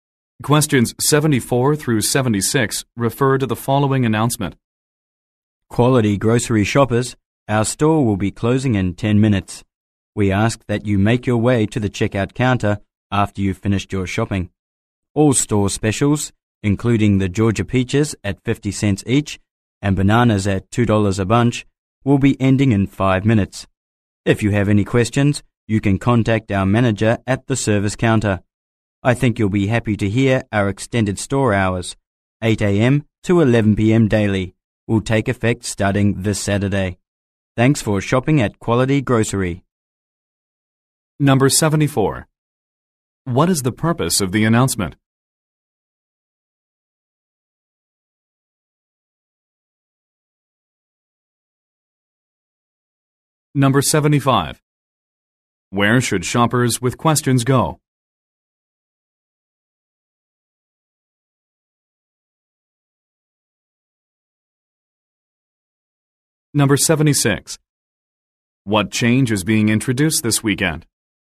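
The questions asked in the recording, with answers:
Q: What is the purpose of the announcement?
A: To say the store is closing soon

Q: Where should shoppers with questions go?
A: To the manager at the service counter

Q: What change is being introduced this weekend?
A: Extended store hours, 8 a.m. to 11 p.m.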